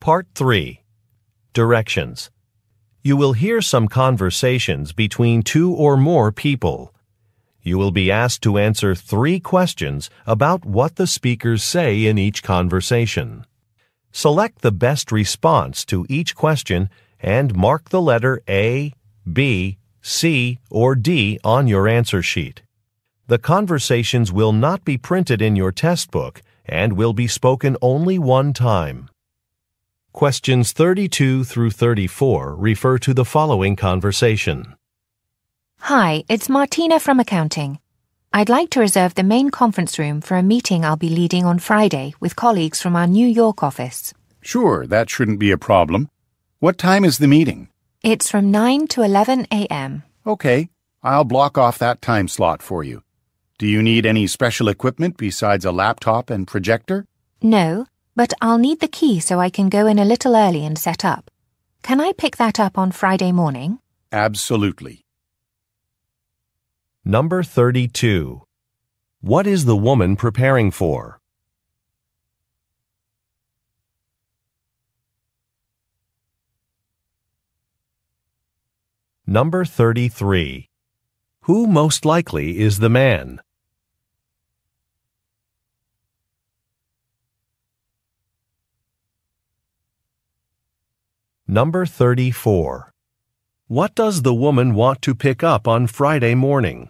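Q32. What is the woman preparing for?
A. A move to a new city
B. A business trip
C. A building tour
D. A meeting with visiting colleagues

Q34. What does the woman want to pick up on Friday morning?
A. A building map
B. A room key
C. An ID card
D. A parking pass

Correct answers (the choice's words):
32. A meeting with visiting colleagues
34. A room key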